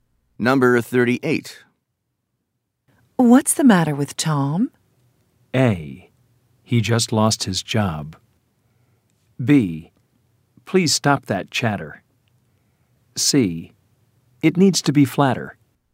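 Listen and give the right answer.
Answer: A: He just lost his job.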